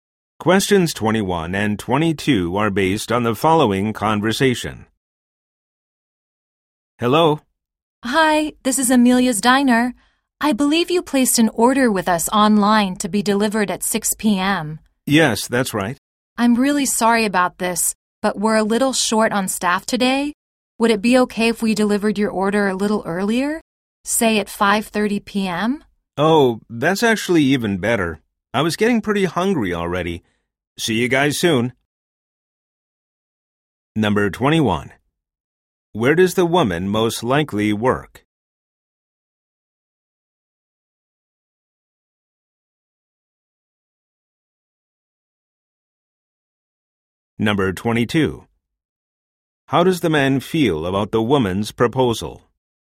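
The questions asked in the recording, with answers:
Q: Where does the woman most likely work?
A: At a restaurant (Amelia's Diner)

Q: How does the man feel about the woman's proposal?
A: Pleased; it's even better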